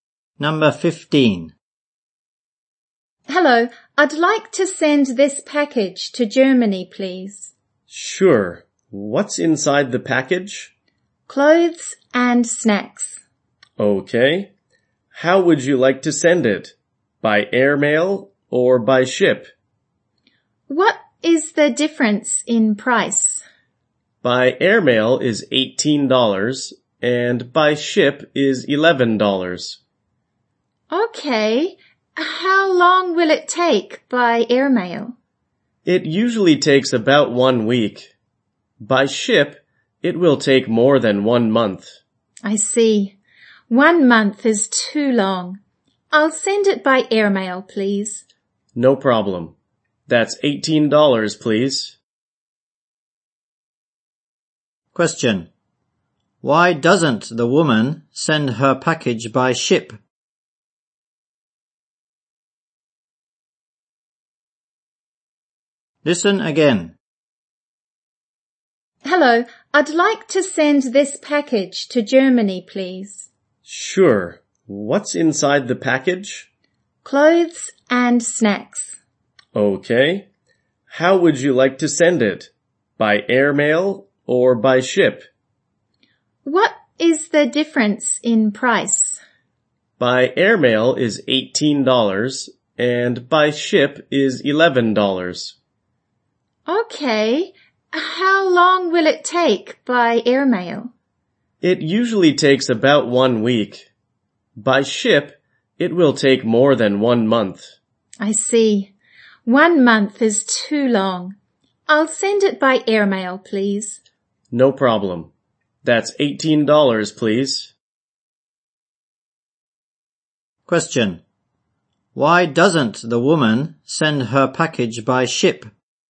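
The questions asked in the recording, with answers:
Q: Why doesn't the woman send her package by ship?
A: It would take more than 1 month, which is too long.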